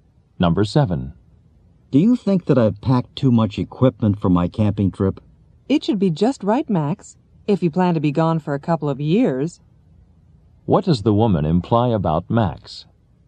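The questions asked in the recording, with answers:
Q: What does the woman imply about Max?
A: He has packed too much equipment.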